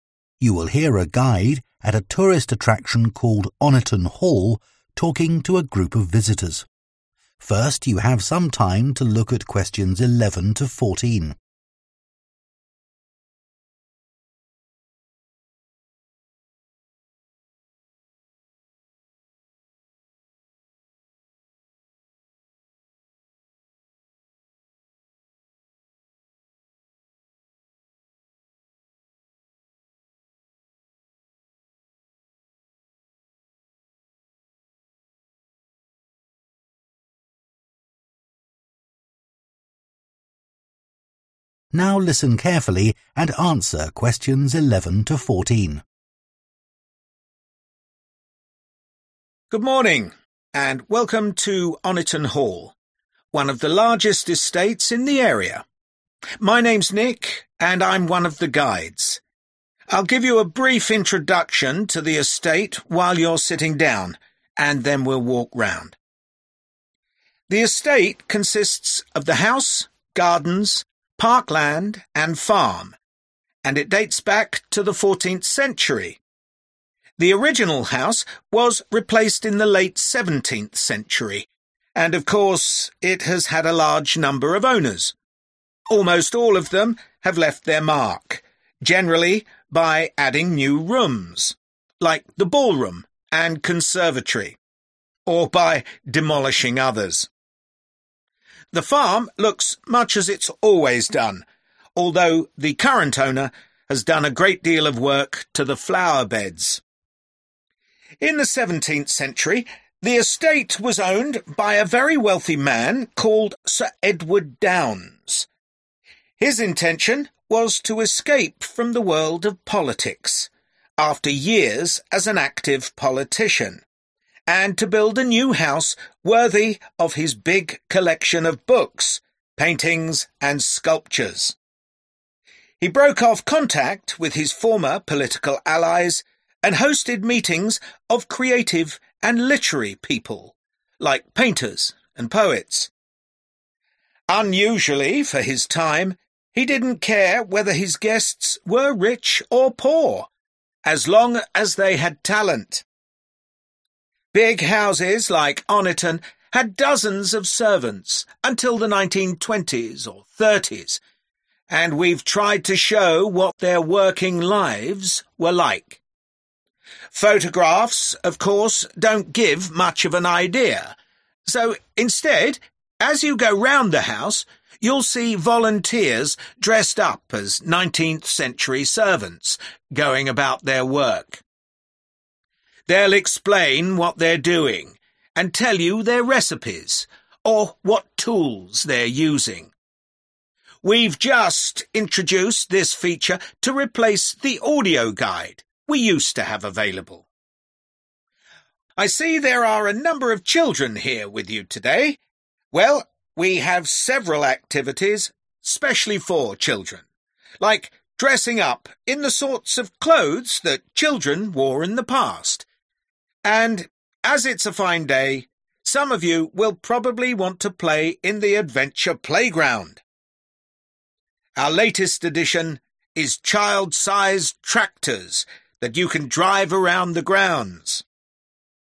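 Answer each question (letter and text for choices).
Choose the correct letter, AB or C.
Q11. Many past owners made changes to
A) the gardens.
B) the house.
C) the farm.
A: B) the house.

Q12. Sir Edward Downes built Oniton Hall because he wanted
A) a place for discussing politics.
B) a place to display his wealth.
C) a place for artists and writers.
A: C) a place for artists and writers.

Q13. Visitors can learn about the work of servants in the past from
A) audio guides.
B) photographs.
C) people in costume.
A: C) people in costume.

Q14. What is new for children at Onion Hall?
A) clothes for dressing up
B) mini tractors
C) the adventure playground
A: B) mini tractors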